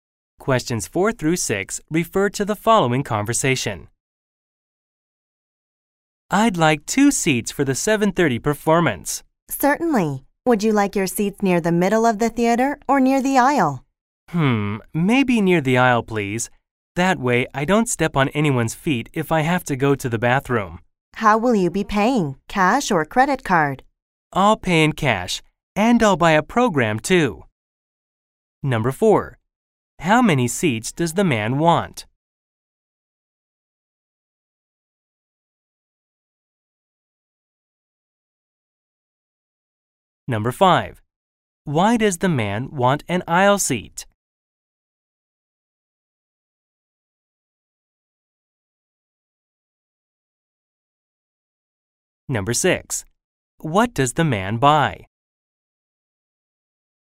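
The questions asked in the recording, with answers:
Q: How many seats does the man want?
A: Two

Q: Why does the man want an aisle seat?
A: So he doesn't step on anyone's feet if he has to go to the bathroom

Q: What does the man buy?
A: A program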